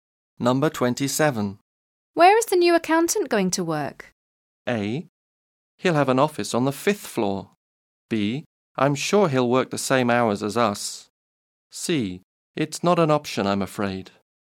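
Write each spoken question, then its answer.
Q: Where is the new accountant going to work?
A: A: He'll have an office on the fifth floor.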